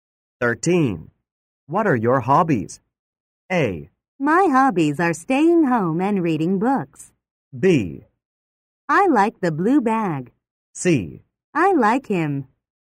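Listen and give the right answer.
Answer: A: My hobbies are staying home and reading books.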